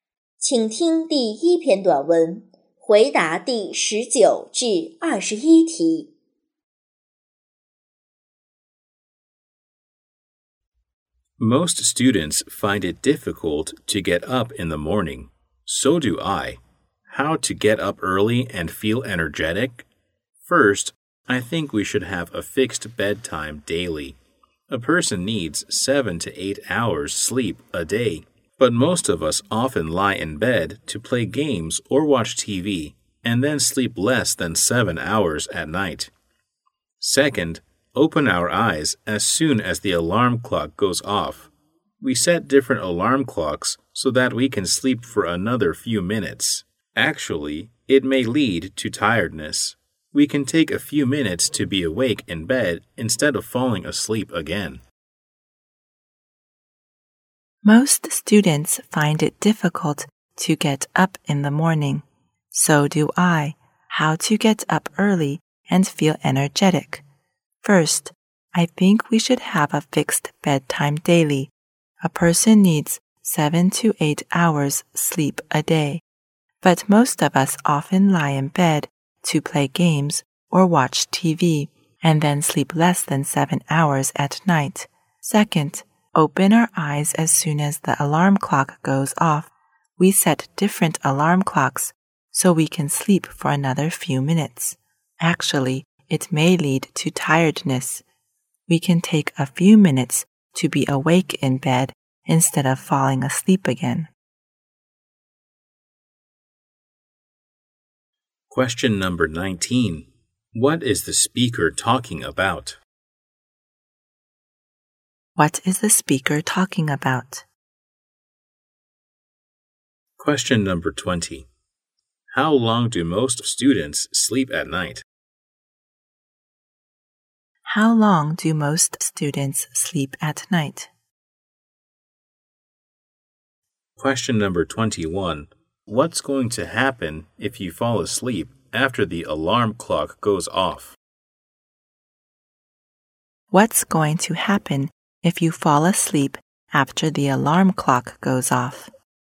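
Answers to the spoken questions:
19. How to get up early and feel energetic
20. Less than 7 hours
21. It may lead to tiredness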